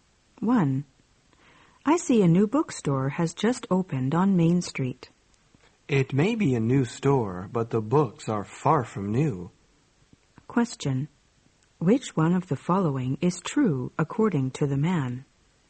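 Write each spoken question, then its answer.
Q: Which one of the following is true according to the man?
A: The bookstore sells used books.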